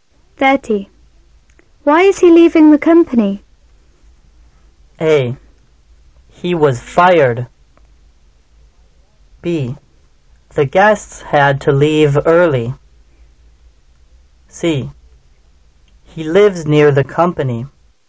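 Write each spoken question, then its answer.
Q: Why is he leaving the company?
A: A: He was fired.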